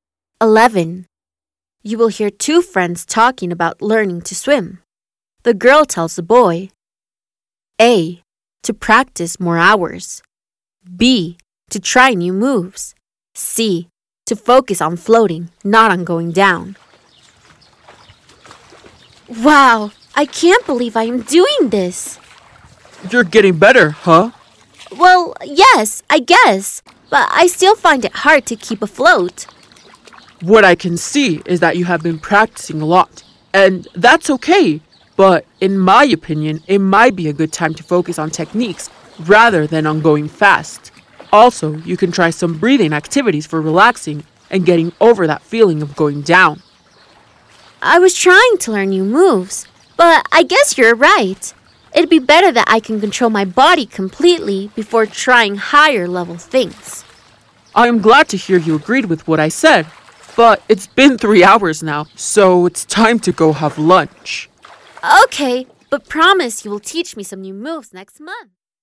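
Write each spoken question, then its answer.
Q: The girl tells the boy, A.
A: C: to focus on floating, not on going down.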